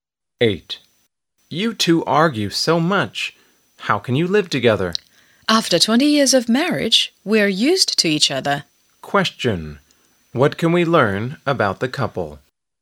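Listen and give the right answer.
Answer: They are used to each other's arguing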